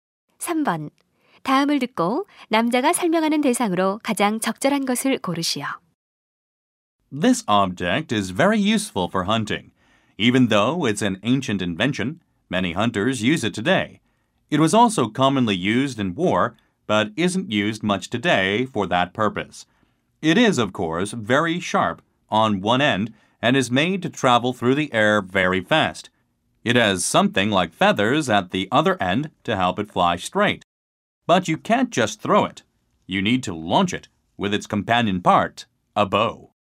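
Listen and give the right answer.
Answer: 화살 (arrow)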